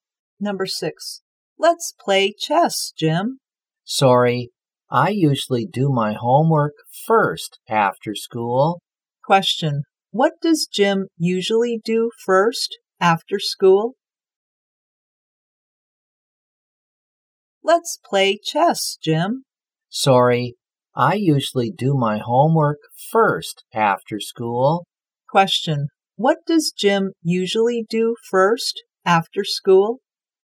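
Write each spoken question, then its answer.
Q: what does Jim usually do first after school?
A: Does his homework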